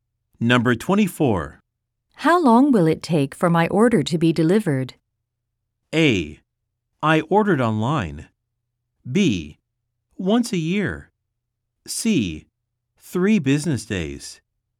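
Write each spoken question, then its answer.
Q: How long will it take for my order to be delivered?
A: C: 3 business days.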